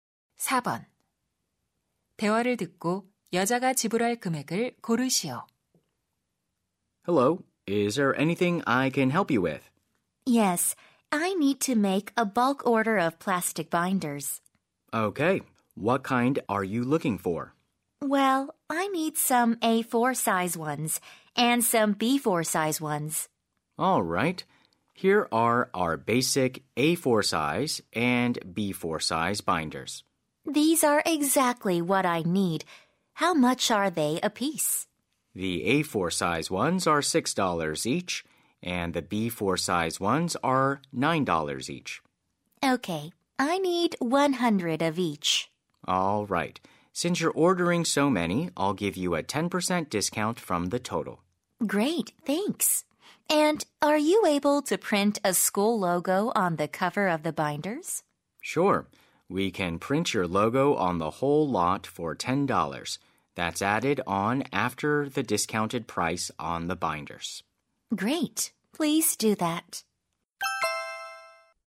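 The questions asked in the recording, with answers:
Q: 대화를 듣고 여자가 지불할 금액을 고르시오.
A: $1,360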